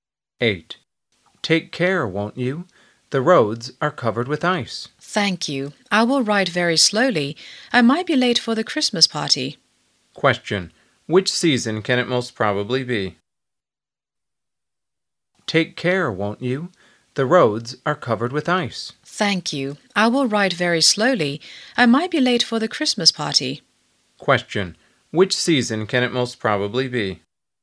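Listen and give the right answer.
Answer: Winter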